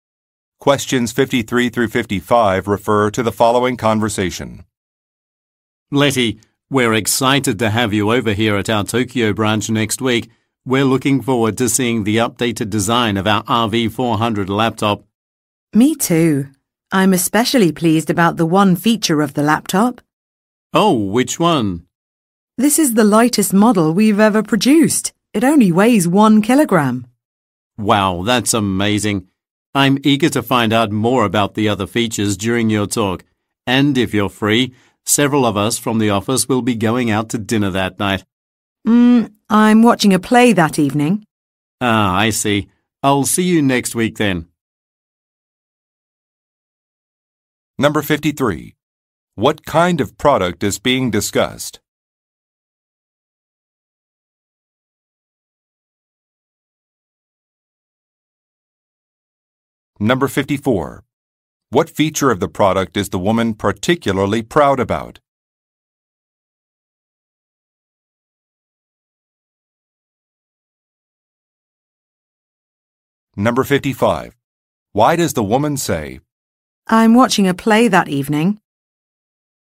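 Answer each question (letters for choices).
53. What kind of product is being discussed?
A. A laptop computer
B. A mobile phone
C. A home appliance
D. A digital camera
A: A

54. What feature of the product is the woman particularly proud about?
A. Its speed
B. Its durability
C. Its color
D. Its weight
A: D

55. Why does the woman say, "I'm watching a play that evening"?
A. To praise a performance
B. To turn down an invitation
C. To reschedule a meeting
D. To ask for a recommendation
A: B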